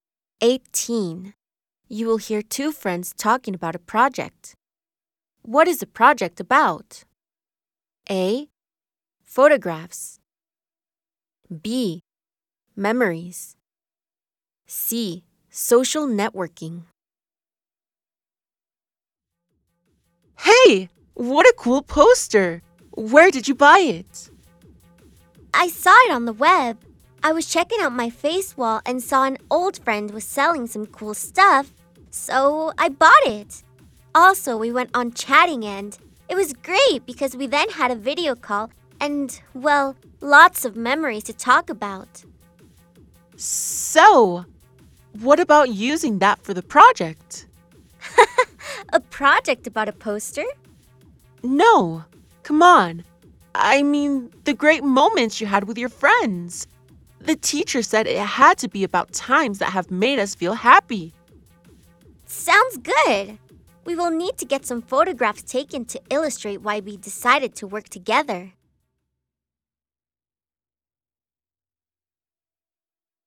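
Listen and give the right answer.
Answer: B: Memories.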